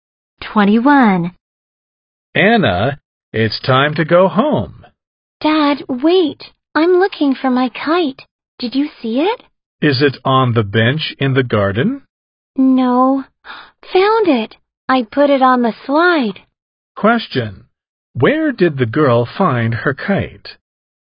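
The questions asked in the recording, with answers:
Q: Where did the girl find her kite?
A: On the slide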